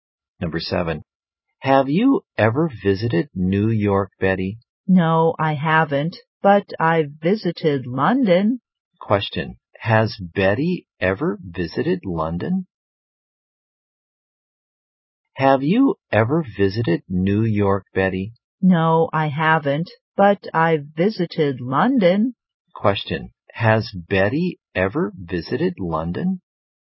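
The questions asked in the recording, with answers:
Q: Question, has Betty ever visited London?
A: Yes, she has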